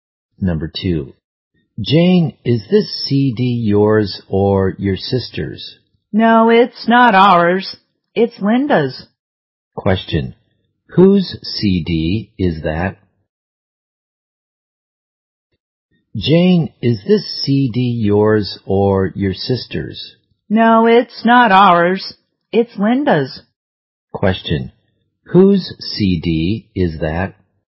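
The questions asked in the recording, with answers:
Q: Question. Whose CD is that?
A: Linda's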